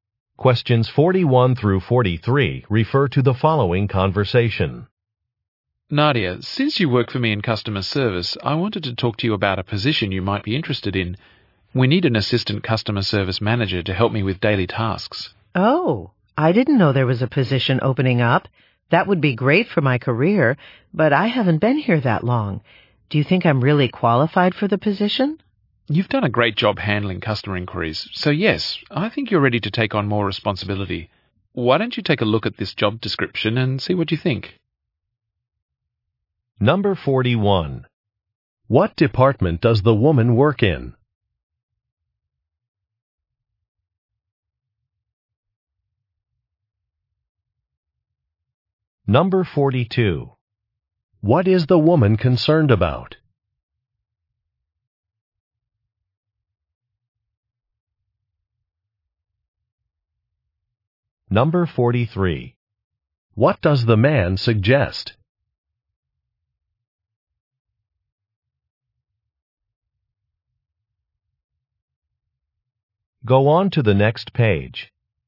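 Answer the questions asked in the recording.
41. Customer service
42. She may not be qualified because she hasn't worked there long
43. Looking at the job description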